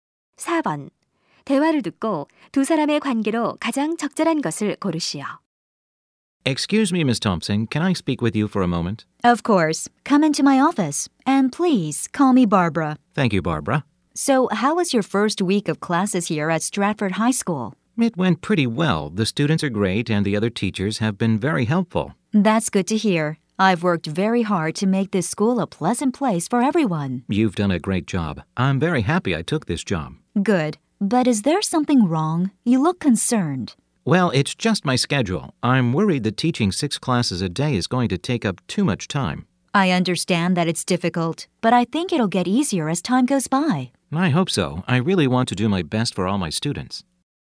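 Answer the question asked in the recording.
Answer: 교장 - 교사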